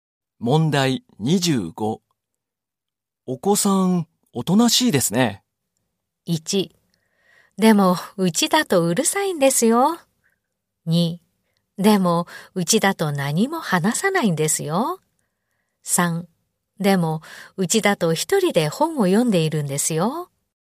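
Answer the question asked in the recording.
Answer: 1: でも、うちだとうるさいんですよ。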